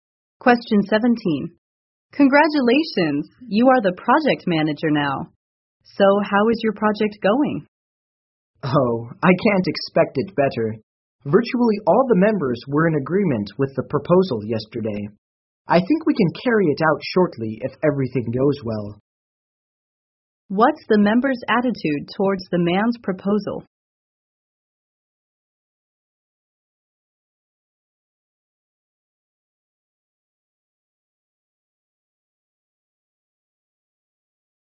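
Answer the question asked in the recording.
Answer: Almost all of them agreed with it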